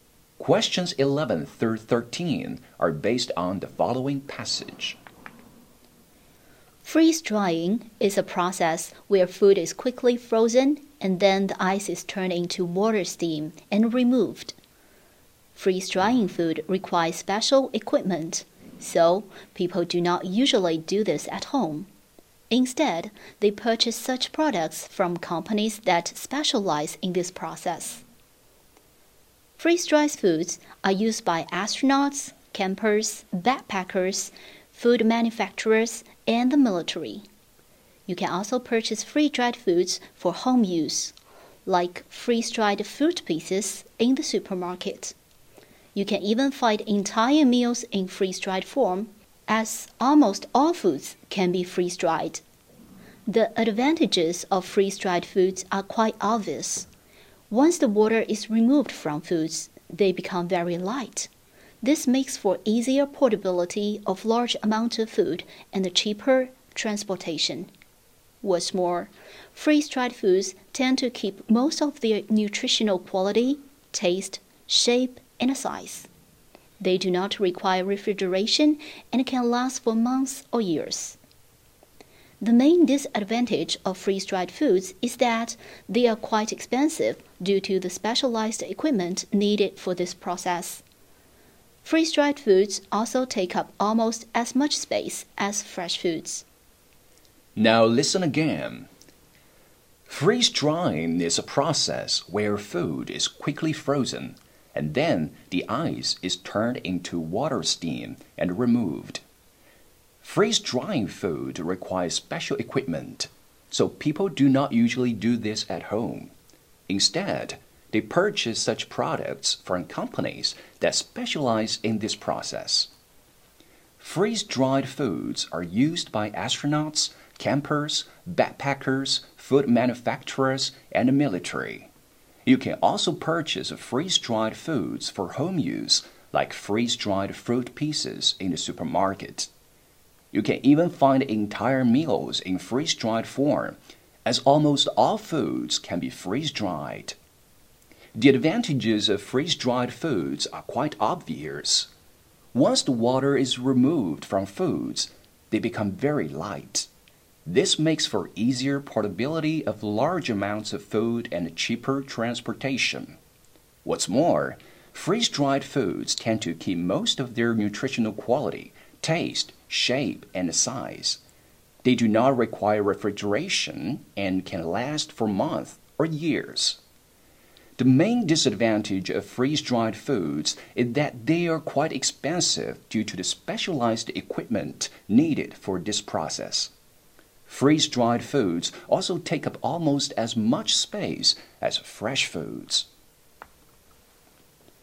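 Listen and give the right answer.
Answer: It requires special equipment.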